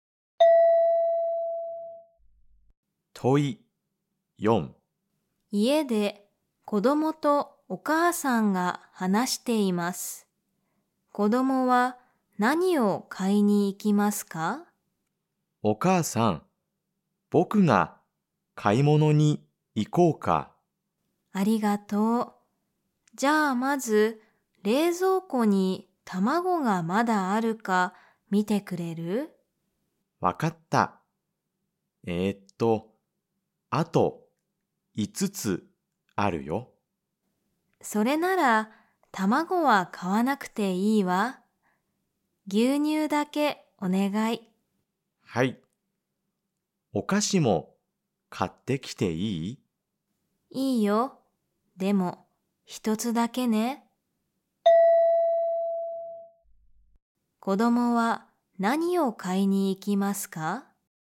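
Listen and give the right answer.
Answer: 牛乳とお菓子一つ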